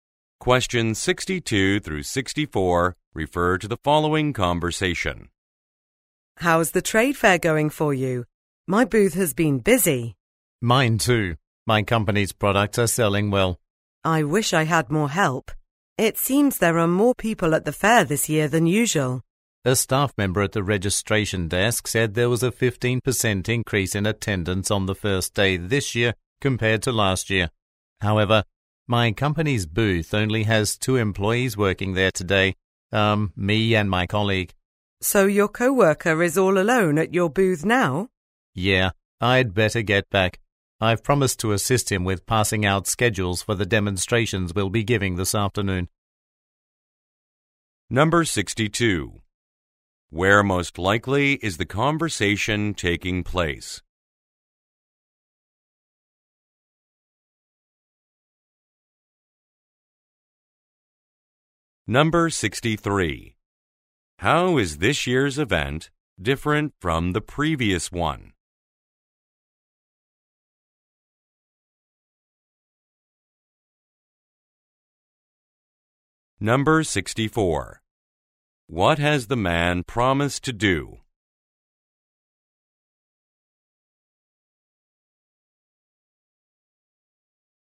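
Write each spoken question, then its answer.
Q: Where most likely is the conversation taking place?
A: At a trade fair

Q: How is this year's event different from the previous one?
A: Attendance has increased (15% more on the first day)

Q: What has the man promised to do?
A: Help his co-worker hand out schedules for the afternoon demonstrations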